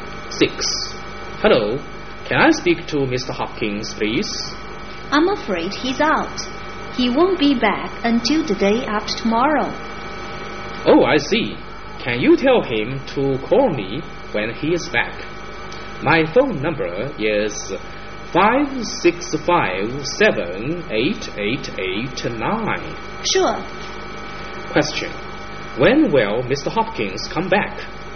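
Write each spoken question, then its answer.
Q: When will Mr. Hopkins come back?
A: The day after tomorrow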